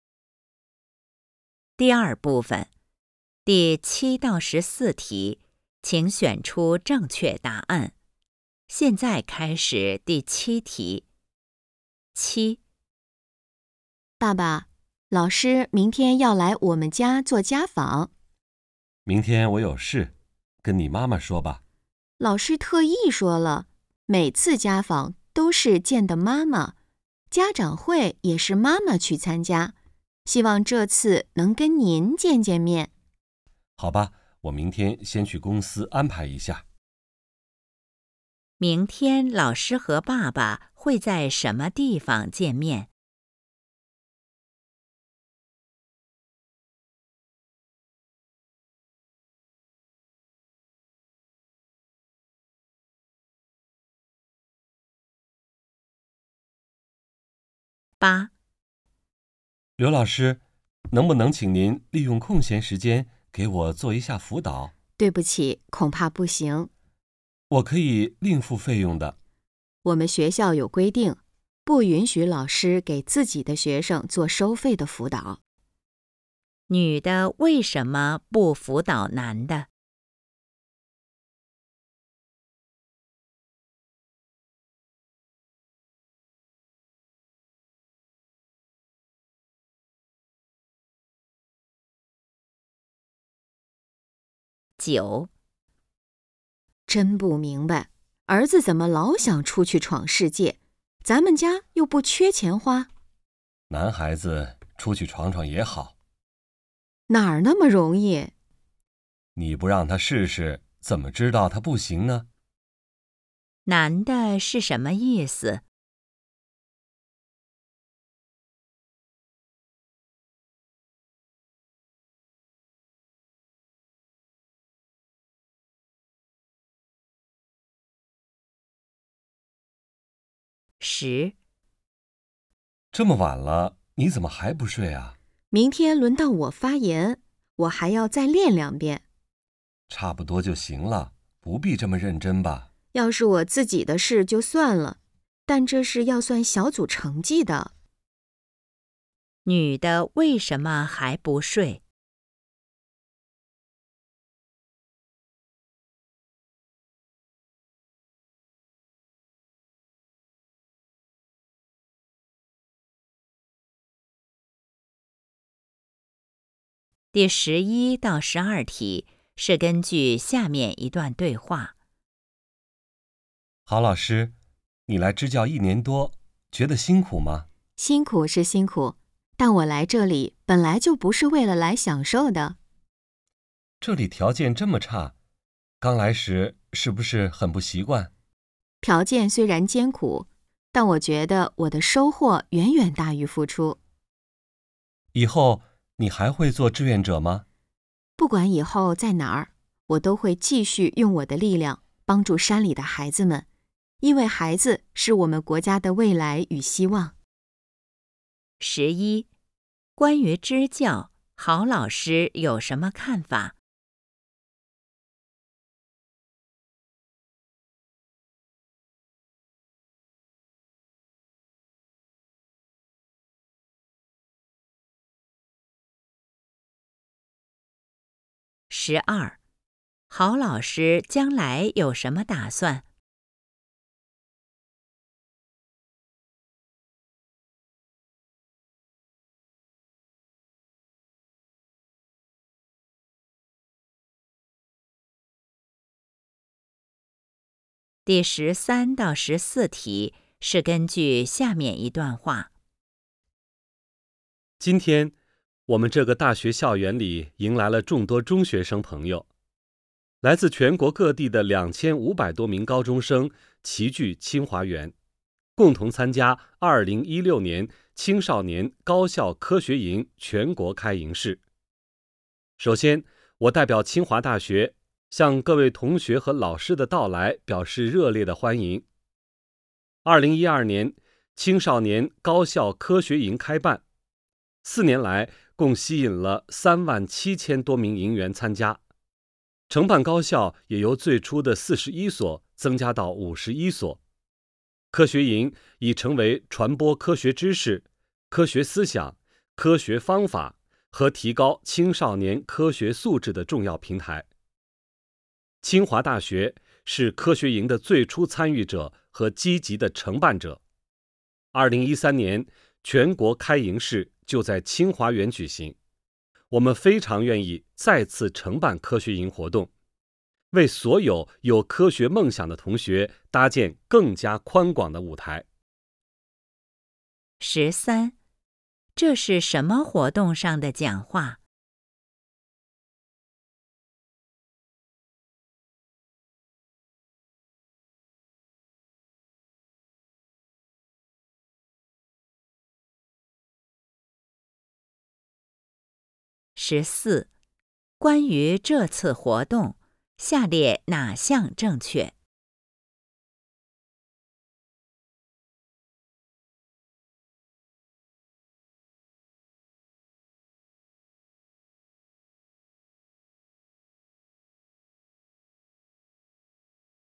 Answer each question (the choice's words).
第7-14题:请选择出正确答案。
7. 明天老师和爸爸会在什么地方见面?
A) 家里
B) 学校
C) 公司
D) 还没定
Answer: 家里

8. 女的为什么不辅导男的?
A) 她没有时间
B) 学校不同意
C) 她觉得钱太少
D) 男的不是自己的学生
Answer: 学校不同意

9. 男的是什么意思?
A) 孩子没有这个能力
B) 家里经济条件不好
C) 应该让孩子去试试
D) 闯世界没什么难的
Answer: 应该让孩子去试试

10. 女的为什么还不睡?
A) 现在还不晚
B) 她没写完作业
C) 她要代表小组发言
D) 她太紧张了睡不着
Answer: 她要代表小组发言

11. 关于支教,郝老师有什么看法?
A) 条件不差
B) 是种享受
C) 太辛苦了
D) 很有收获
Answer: 很有收获

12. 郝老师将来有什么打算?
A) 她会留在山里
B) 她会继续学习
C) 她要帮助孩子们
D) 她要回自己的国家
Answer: 她要帮助孩子们

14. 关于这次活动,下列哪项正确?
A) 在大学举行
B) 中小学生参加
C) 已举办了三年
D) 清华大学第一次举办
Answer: 在大学举行

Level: HSK 5